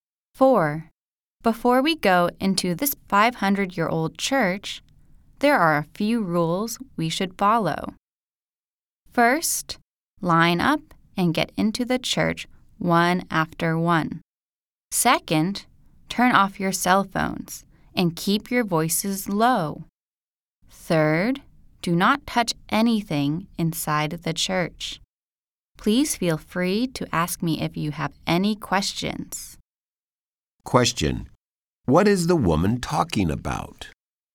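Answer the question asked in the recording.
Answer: Rules for visiting the church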